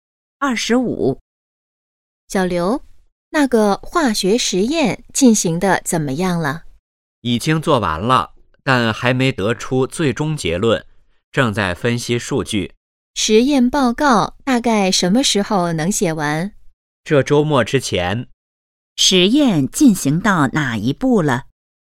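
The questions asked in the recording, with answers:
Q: 实验进行到哪一步了?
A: 正在分析数据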